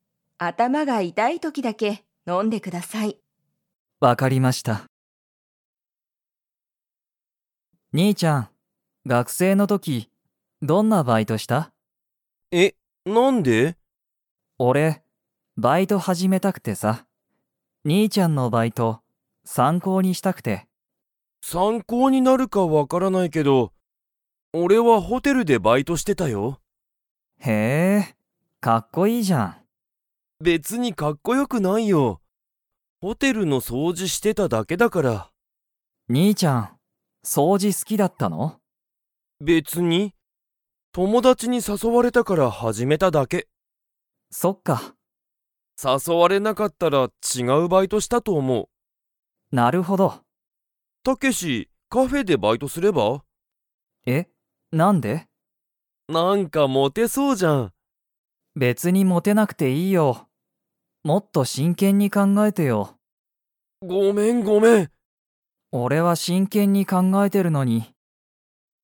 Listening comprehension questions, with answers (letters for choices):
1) ケントは、バイトで の掃除(そうじ)をしてた。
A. ホテル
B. レストラン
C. カフェ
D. 学校(がっこう)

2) ケントは掃除(そうじ)がとても好(す)きですか?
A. はい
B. いいえ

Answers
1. A
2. B

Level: Level 4